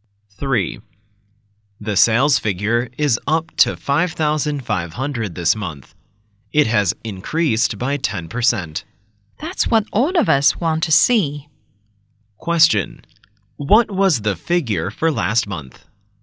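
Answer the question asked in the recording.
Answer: About 5,000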